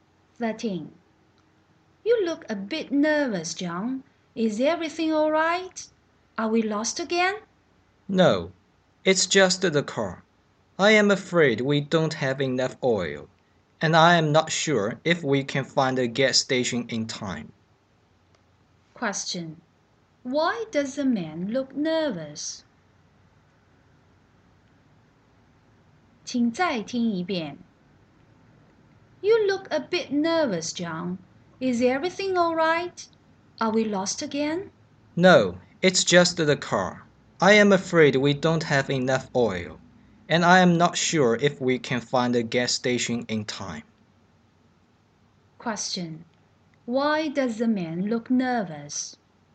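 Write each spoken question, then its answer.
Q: Question. Why does the man look nervous?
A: The car doesn't have enough oil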